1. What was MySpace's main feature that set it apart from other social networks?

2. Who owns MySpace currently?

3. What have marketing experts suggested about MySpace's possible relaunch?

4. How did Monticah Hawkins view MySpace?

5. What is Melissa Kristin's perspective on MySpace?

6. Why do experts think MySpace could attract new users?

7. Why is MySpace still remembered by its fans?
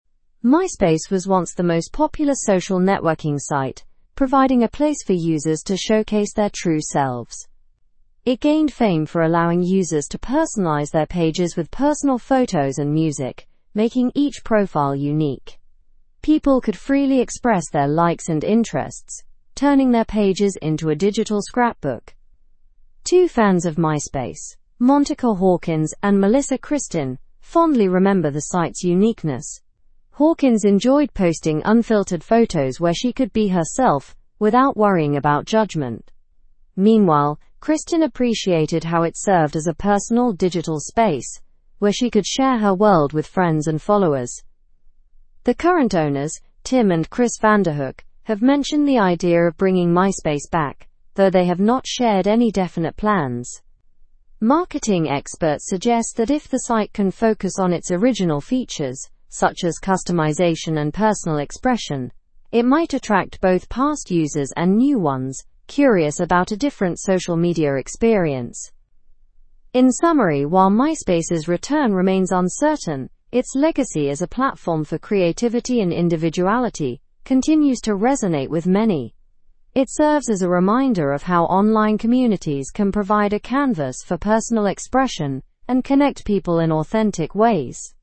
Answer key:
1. MySpace allowed users to customize their pages with photos and music.
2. Tim and Chris Vanderhook.
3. They believe it should focus on its original strengths like customization.
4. She enjoyed uploading unfiltered photos without fear of judgment.
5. She saw it as a personal digital space to share with friends.
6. It could offer a different social media experience that focuses on personal expression.
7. It is remembered for its creativity and allowing individuality.

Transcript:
MySpace was once the most popular social networking site, providing a place for users to showcase their true selves. It gained fame for allowing users to personalize their pages with personal photos and music, making each profile unique. People could freely express their likes and interests, turning their pages into a digital scrapbook.
Two fans of MySpace, Monticah Hawkins and Melissa Kristin, fondly remember the site's uniqueness. Hawkins enjoyed posting unfiltered photos where she could be herself without worrying about judgment. Meanwhile, Kristin appreciated how it served as a personal digital space where she could share her world with friends and followers.
The current owners, Tim and Chris Vanderhook, have mentioned the idea of bringing MySpace back, though they have not shared any definite plans. Marketing experts suggest that if the site can focus on its original features, such as customization and personal expression, it might attract both past users and new ones curious about a different social media experience.
In summary, while MySpace's return remains uncertain, its legacy as a platform for creativity and individuality continues to resonate with many. It serves as a reminder of how online communities can provide a canvas for personal expression and connect people in authentic ways.

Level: (Level 3)